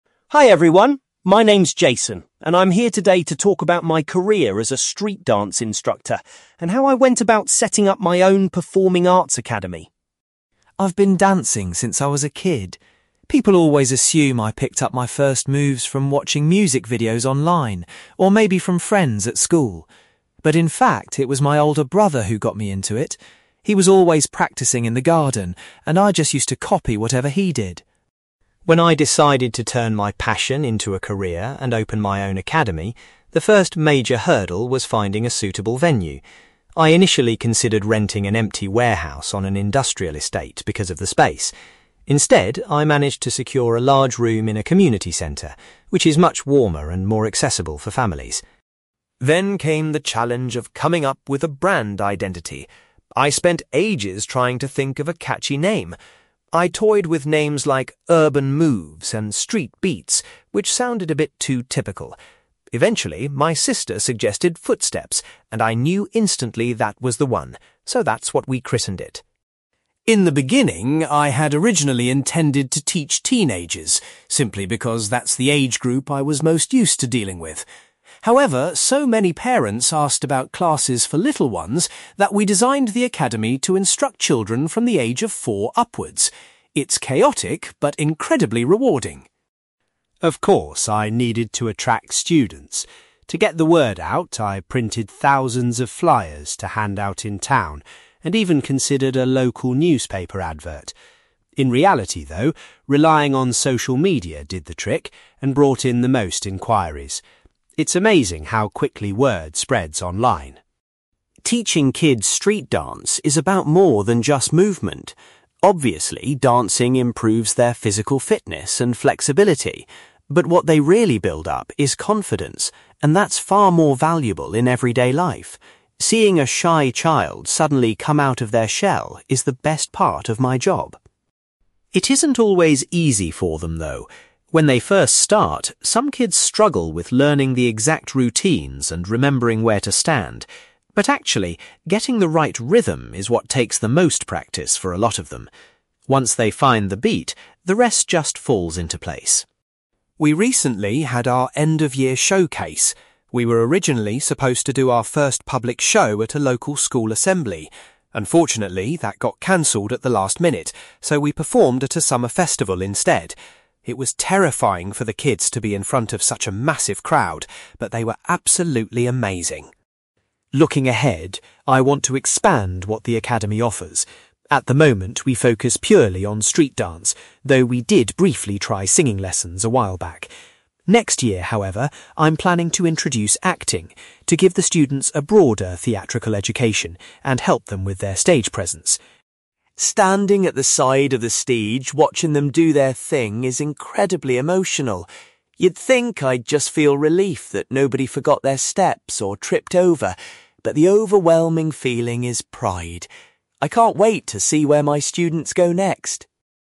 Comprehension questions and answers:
You will hear a street-dance instructor called Jason talking about establishing his own performing arts academy. For questions 9-18, complete the sentences with a word or short phrase.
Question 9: Jason says his (9)........................... first introduced him to street-dance.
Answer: older brother

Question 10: Jason chose to base his new academy in a (10)........................... .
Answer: community centre

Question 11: Jason decided to name his academy (11)........................... .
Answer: Footsteps

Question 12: The youngest students at Jason's academy are (12)........................... years old.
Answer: four / 4

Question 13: Jason found that using (13)........................... was the best way to advertise his classes.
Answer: social media

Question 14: Jason believes the most important thing his students develop is (14)........................... .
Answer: confidence

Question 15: Jason says that developing good (15)........................... is the hardest part for some beginners.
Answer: rhythm

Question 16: The academy's first public performance took place at a (16)........................... .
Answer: summer festival

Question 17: Next year, Jason plans to offer classes in (17)........................... as well as dance.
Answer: acting

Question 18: Jason uses the word (18)........................... to describe how he feels watching his students perform.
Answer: pride

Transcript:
Jason: Hi everyone. My name's Jason, and I'm here today to talk about my career as a street-dance instructor and how I went about setting up my own performing arts academy.
I've been dancing since I was a kid. People always assume I picked up my first moves from watching music videos online, or maybe from friends at school. But in fact, it was my older brother who got me into it. He was always practising in the garden, and I just used to copy whatever he did.
When I decided to turn my passion into a career and open my own academy, the first major hurdle was finding a suitable venue. I initially considered renting an empty warehouse on an industrial estate because of the space. Instead, I managed to secure a large room in a community centre, which is much warmer and more accessible for families.
Then came the challenge of coming up with a brand identity. I spent ages trying to think of a catchy name. I toyed with names like 'Urban Moves' and 'Street Beats', which sounded a bit too typical. Eventually, my sister suggested Footsteps, and I knew instantly that was the one, so that's what we christened it.
In the beginning, I had originally intended to teach teenagers, simply because that's the age group I was most used to dealing with. However, so many parents asked about classes for little ones that we designed the academy to instruct children from the age of four upwards. It's chaotic, but incredibly rewarding!
Of course, I needed to attract students. To get the word out, I printed thousands of flyers to hand out in town, and even considered a local newspaper advert. In reality, though, relying on social media did the trick and brought in the most enquiries. It's amazing how quickly word spreads online.
Teaching kids street-dance is about more than just movement. Obviously, dancing improves their physical fitness and flexibility. But what they really build up is confidence, and that's far more valuable in everyday life. Seeing a shy child suddenly come out of their shell is the best part of my job.
It isn't always easy for them, though. When they first start, some kids struggle with learning the exact routines and remembering where to stand. But actually, getting the right rhythm is what takes the most practice for a lot of them. Once they find the beat, the rest just falls into place.
We recently had our end-of-year showcase. We were originally supposed to do our first public show at a local school assembly. Unfortunately, that got cancelled at the last minute, so we performed at a summer festival instead. It was terrifying for the kids to be in front of such a massive crowd, but they were absolutely amazing.
Looking ahead, I want to expand what the academy offers. At the moment we focus purely on street-dance, though we did briefly try singing lessons a while back. Next year, however, I'm planning to introduce acting, to give the students a broader theatrical education and help them with their stage presence.
Standing at the side of the stage watching them do their thing is incredibly emotional. You'd think I'd just feel relief that nobody forgot their steps or tripped over, but the overwhelming feeling is pride. I can't wait to see where my students go next!

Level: B2